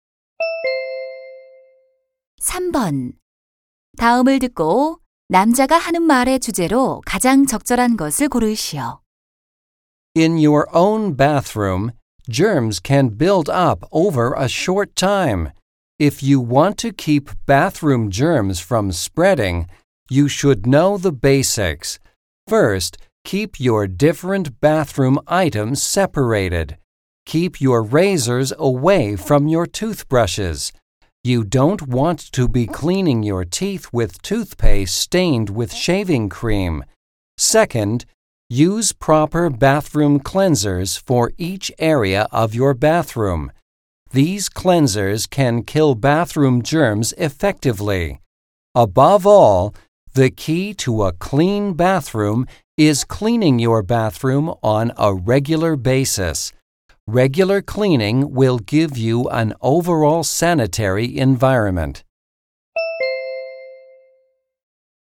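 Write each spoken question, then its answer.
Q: 다음을 듣고 남자가 하는 말의 주제로 가장 적절한 것을 고르시오.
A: 욕실을 깨끗하게 유지하는 방법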